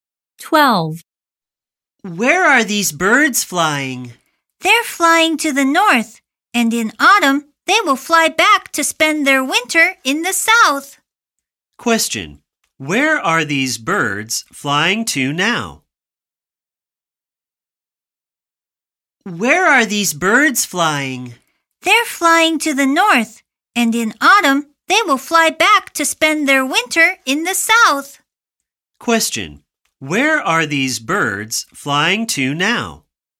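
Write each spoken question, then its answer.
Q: Where are these birds flying to now?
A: To the north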